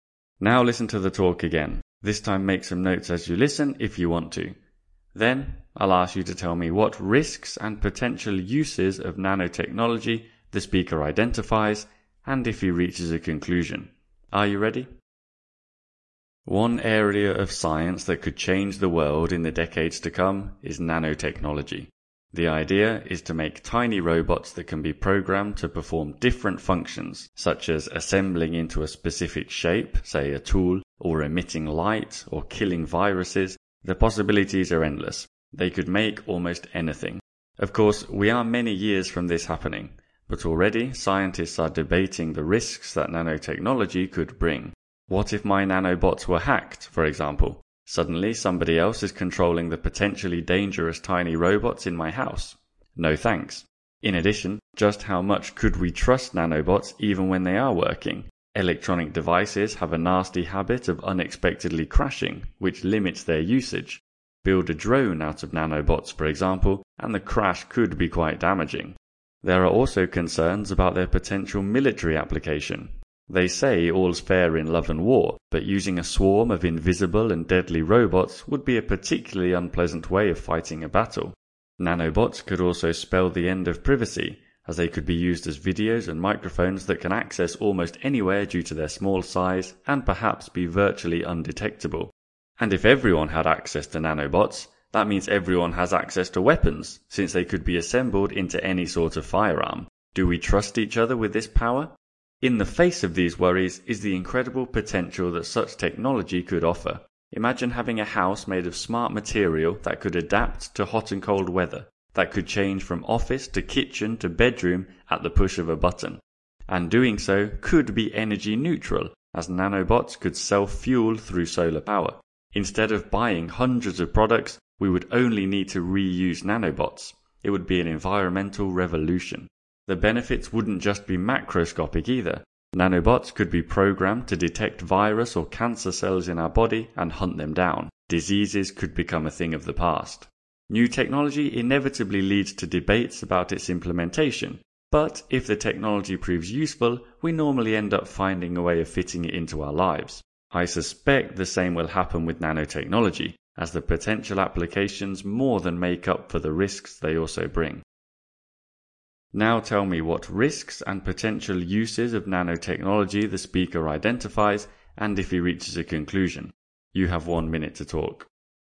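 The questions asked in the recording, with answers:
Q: Now tell me what risks and potential uses of nanotechnology the speaker identifies, and if he reaches a conclusion.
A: Risks: hacking, crashing, military use, loss of privacy, easy access to weapons. Uses: adaptable smart houses, energy-neutral solar power, reusing nanobots instead of buying products, detecting and destroying viruses and cancer cells. Conclusion: the benefits outweigh the risks, so we will find a way to use it.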